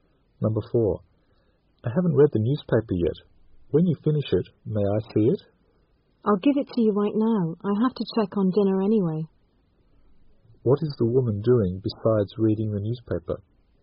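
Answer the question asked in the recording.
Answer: Cooking dinner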